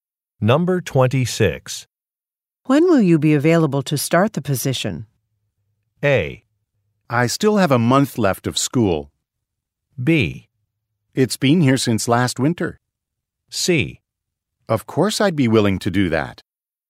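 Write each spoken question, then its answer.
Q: When will you be available to start the position?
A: A: I still have a month left of school.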